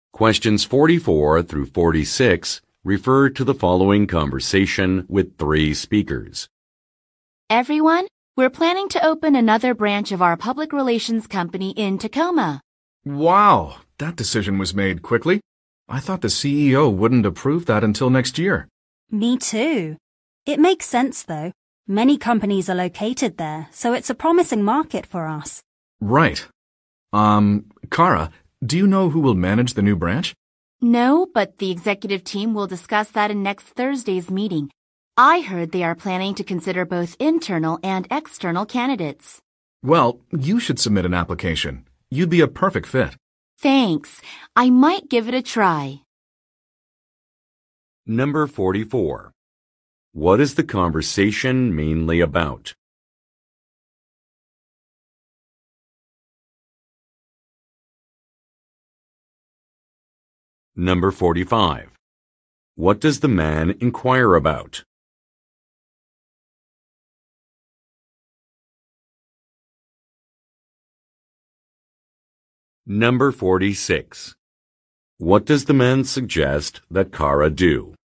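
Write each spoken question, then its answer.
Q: What is the conversation mainly about?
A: Opening a new branch of the company in Tacoma

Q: What does the man inquire about?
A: Who will manage the new branch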